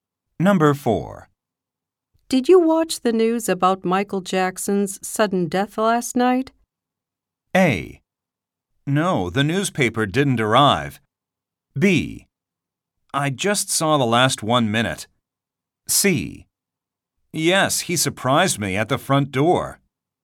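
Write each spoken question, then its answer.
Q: Did you watch the news about Michael Jackson's sudden death last night?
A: B: I just saw the last 1 minute.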